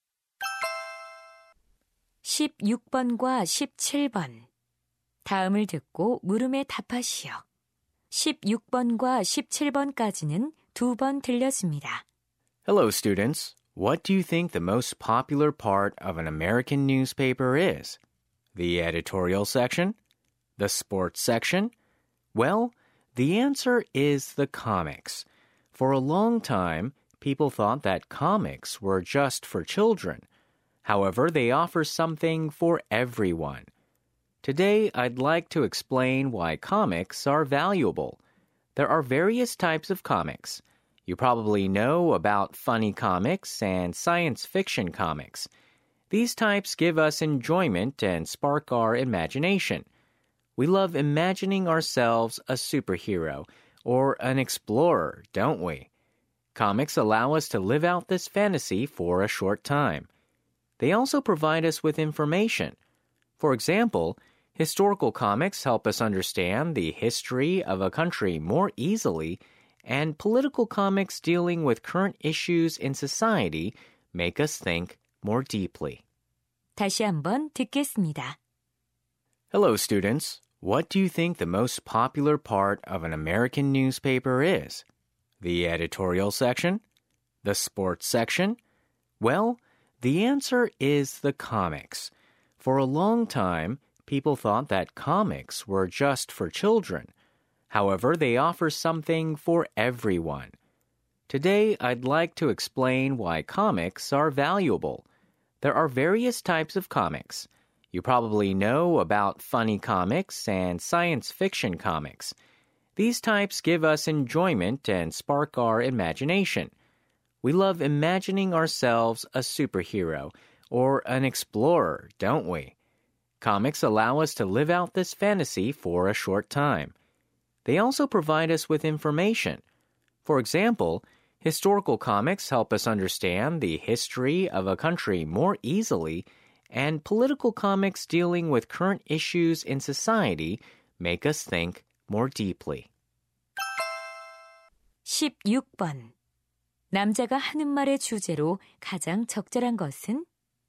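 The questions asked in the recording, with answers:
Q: 남자가 하는 말의 주제로 가장 적절한 것은?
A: 만화가 가치 있는 이유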